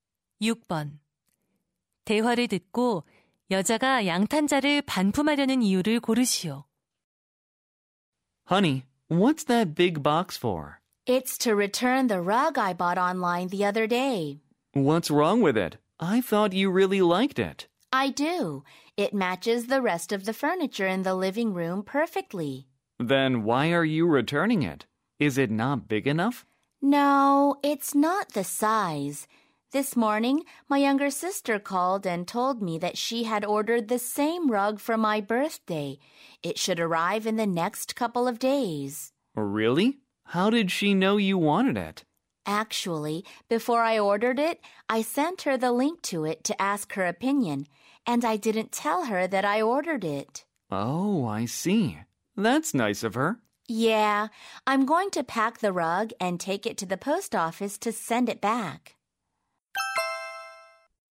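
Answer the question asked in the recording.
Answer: 여동생이 생일 선물로 같은 양탄자를 주문해서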